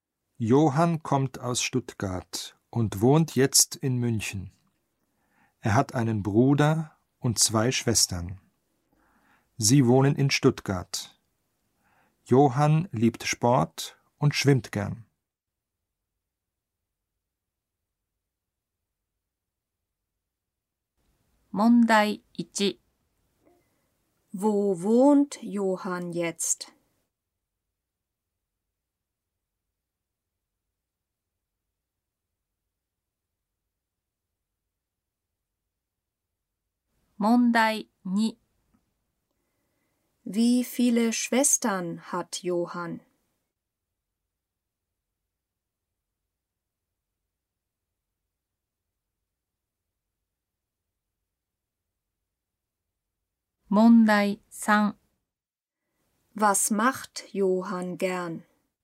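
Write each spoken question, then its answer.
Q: Wo wohnt Johann jetzt?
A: In München

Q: Wie viele Schwestern hat Johann?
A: Zwei

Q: Was macht Johann gern?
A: Er schwimmt gern (Sport)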